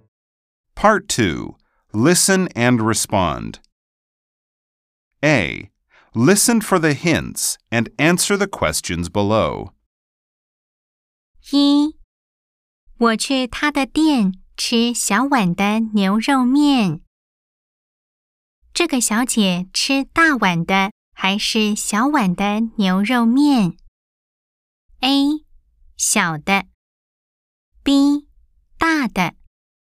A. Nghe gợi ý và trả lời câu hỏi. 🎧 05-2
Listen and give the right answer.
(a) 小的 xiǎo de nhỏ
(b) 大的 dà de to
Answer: (a) 小的 xiǎo de nhỏ